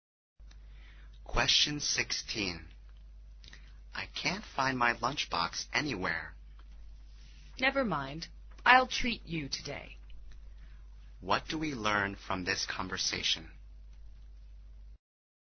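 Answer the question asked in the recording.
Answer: The speaker can't find the lunchbox, so the other will pay for lunch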